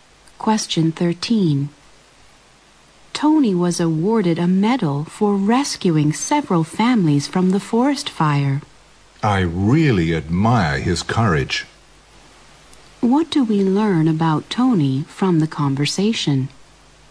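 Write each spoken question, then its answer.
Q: What do we learn about Tony from the conversation?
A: He bravely rescued several families from a forest fire and was given a medal for it.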